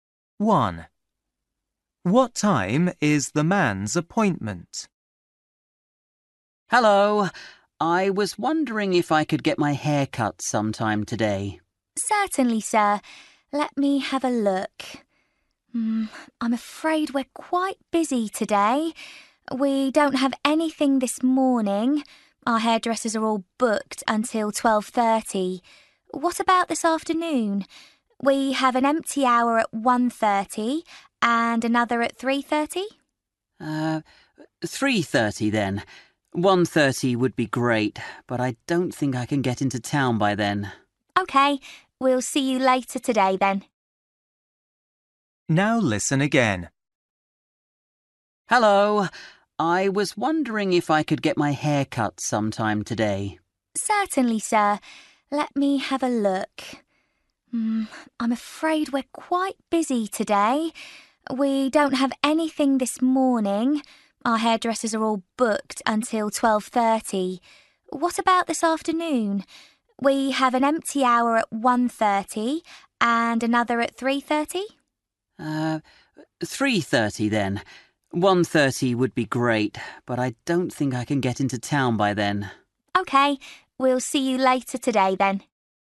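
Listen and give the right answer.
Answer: 3:30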